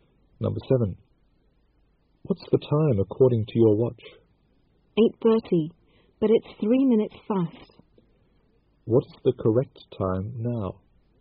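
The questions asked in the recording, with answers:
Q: What's the correct time now?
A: 8:27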